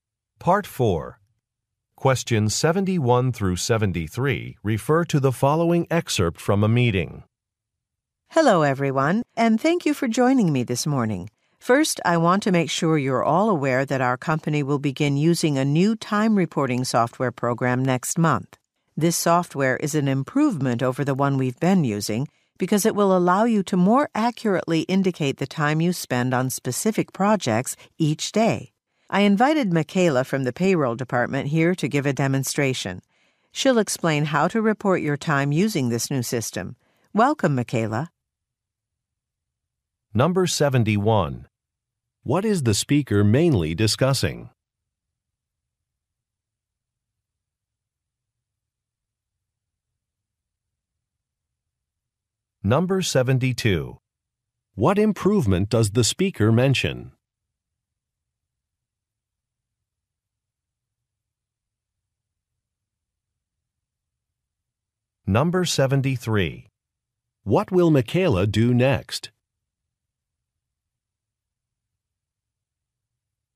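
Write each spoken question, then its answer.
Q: What is the speaker mainly discussing?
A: A new time reporting software program

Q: What improvement does the speaker mention?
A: More accurate reporting of time spent on specific projects

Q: What will Michaela do next?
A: Give a demonstration of the new system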